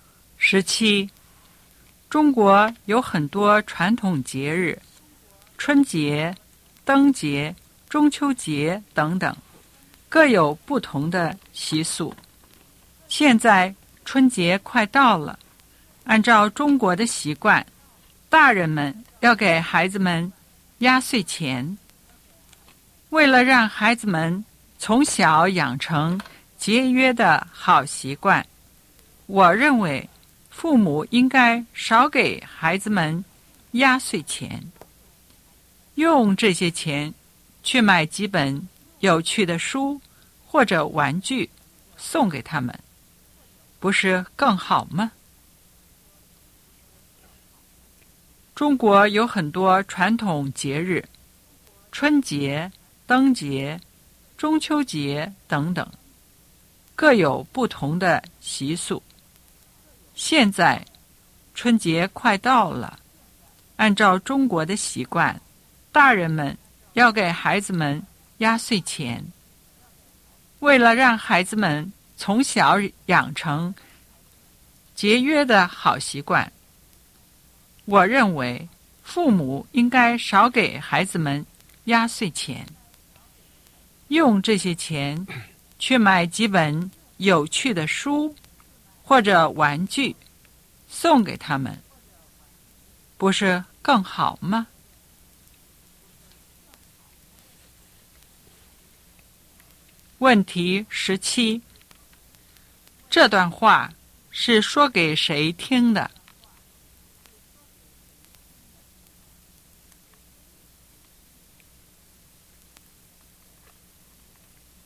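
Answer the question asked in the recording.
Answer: 父母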